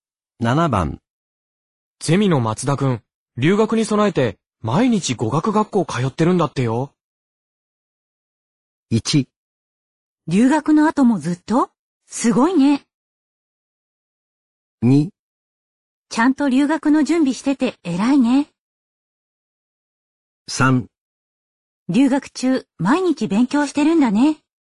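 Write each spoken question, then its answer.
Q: ゼミの松田くん、留学に備えて毎日語学学校通ってるんだってよ。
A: 2: ちゃんと留学の準備してて偉いね。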